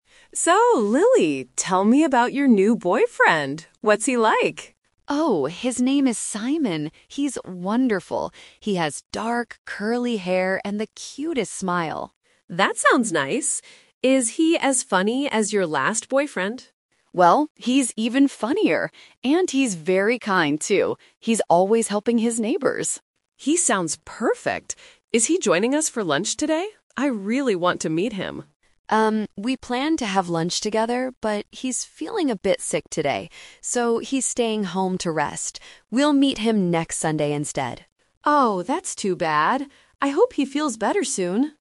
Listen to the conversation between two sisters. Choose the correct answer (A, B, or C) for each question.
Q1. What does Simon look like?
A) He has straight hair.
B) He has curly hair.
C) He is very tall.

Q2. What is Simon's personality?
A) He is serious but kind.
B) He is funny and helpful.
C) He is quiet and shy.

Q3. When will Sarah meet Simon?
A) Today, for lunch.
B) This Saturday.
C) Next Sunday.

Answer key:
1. B) He has curly hair.
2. B) He is funny and helpful.
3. C) Next Sunday.

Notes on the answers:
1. Lily explicitly says Simon has "dark, curly hair". Option (A) is the opposite of the script. Option (C) is plausible but not mentioned in the audio.
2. Lily describes Simon as "funnier" and "kind" because he is "always helping people". These are synonyms for "funny and helpful". Option (A) is a trap because he is kind, but not "serious".
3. This is "The Twist" (Kỹ thuật bẻ lái). They planned to meet "today", but Simon is sick. Lily says, "We'll meet him next Sunday instead." Option (A) is a trap because it was the original plan, but it changed. Option (B) is not mentioned.

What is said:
Sarah (Older sister): So, Lily, tell me about your new boyfriend. What's he like?
Lily (Younger sister): Oh, his name is Simon. He's wonderful! He has dark, curly hair and the cutest smile.
Sarah: That sounds nice. Is he as funny as your last boyfriend?
Lily: Well, he's even funnier! And he's very kind, too. He's always helping his neighbors.
Sarah: He sounds perfect. Is he joining us for lunch today? I really want to meet him.
Lily: Um, we planned to have lunch together, but he's feeling a bit sick today. So, he's staying home to rest. We'll meet him next Sunday instead.

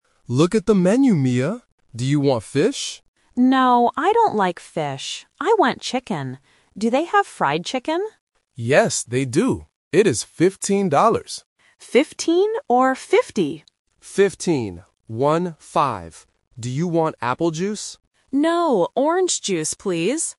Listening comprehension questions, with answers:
Listen to the conversation between a father and his daughter. Choose the correct answer (A, B, or C).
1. What does Mia want to eat?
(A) Fish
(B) Fried chicken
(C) Beef steak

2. How much is the fried chicken?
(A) $15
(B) $50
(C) $5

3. What will Mia drink?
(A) Apple juice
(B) Orange juice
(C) Milk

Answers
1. (B) Fried chicken
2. (A) $15
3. (B) Orange juice

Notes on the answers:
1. Mia clearly says, "I want chicken. Do they have fried chicken?" Why the trap is wrong: Option A (Fish) is a trap. The Dad asks if she wants fish, but she says "No, I don't like fish." Option C is plausible in a restaurant but not mentioned.
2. The Dad says the price is 15 dollars and clarifies it by saying "One-five." Why the trap is wrong: Option B ($50) is a phonetic trap. 15 (fifteen) and 50 (fifty) sound similar, and Mia asks "15 or 50?" to clarify, but the Dad confirms it is 15. Option C is not mentioned.
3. Mia says, "orange juice, please!" at the end of the conversation. Why the trap is wrong: Option A (Apple juice) is a trap. The Dad suggests apple juice, but Mia rejects it by saying "No". Option C is not mentioned.

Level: A1

